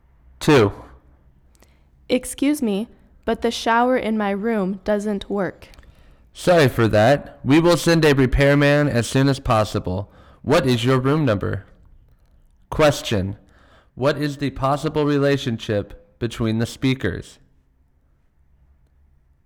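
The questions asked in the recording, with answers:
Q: What is the possible relationship between the speakers?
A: Hotel guest and receptionist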